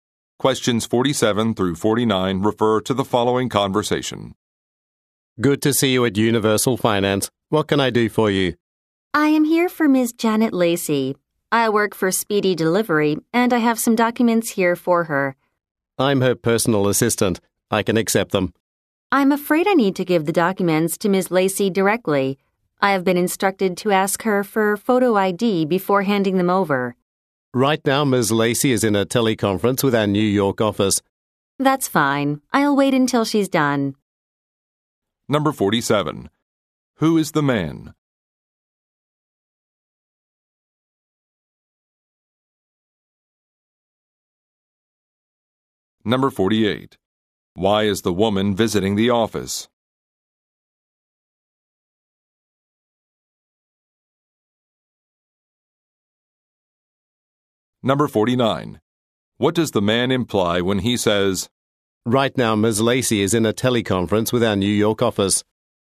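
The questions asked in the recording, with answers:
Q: Who is the man?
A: Ms. Lacey's personal assistant

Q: Why is the woman visiting the office?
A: To deliver documents to Ms. Lacey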